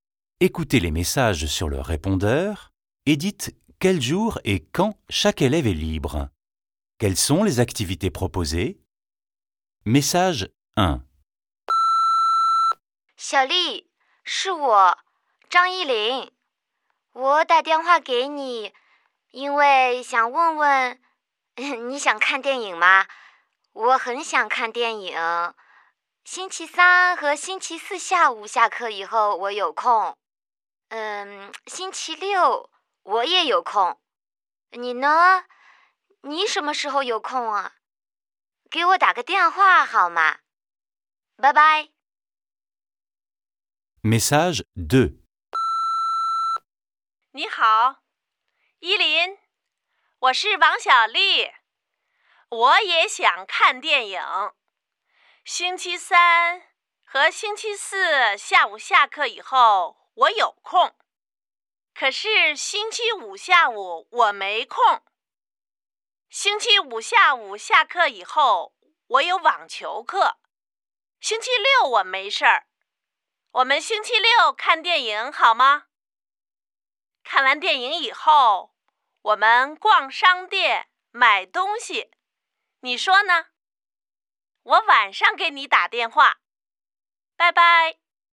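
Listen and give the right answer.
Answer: Voir un film, puis faire les magasins (faire des achats)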